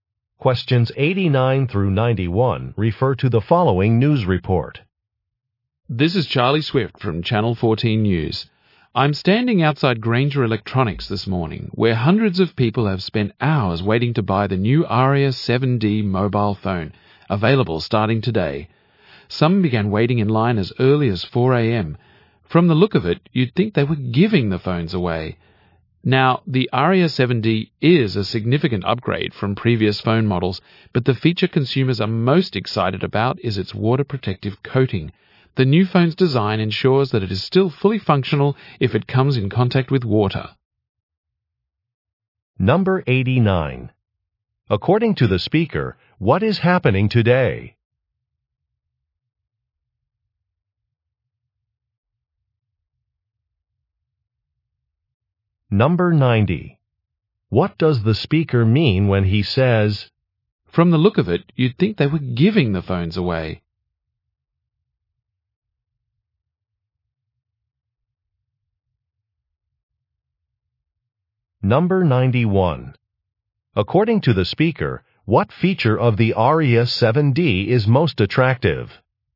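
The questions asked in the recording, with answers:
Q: According to the speaker, what is happening today?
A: A new mobile phone goes on sale

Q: What does the speaker mean when he says,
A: Lots of people are waiting to buy the phone

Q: According to the speaker, what feature of the Aria 7D is most attractive?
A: Its water-protective coating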